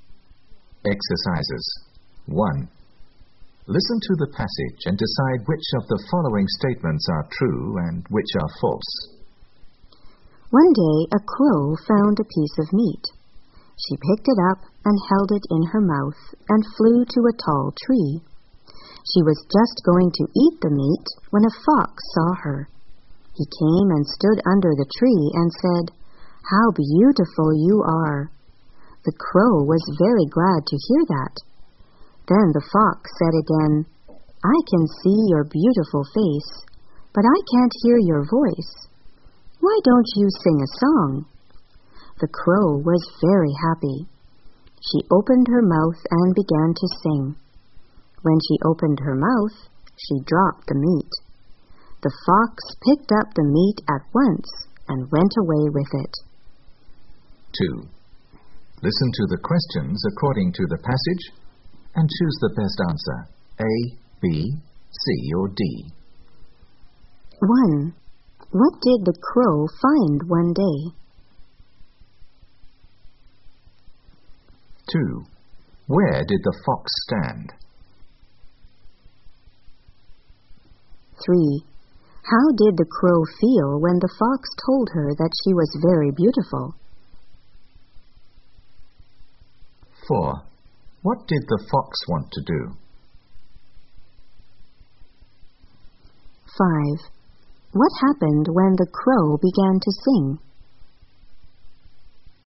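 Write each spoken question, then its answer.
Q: What did the crow find one day?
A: A piece of meat

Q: Where did the fox stand?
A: Under the tree

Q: How did the crow feel when the fox told her that she was very beautiful?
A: Very glad

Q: What happened when the crow began to sing?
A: She dropped the meat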